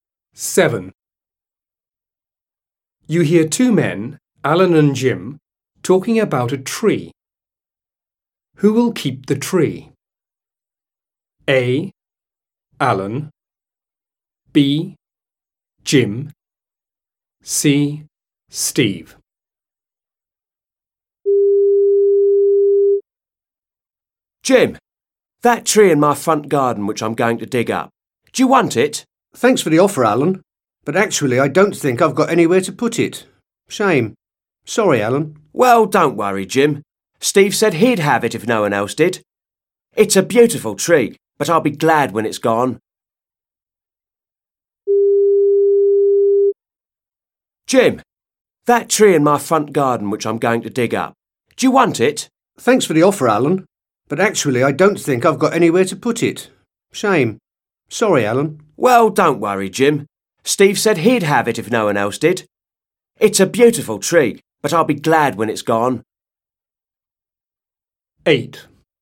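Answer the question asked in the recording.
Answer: C: Steve.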